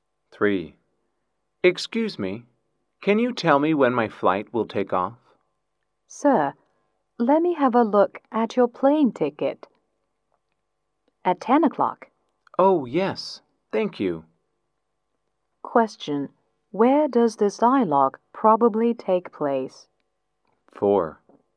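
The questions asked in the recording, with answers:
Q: Question, where does this dialogue probably take place?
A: At the airport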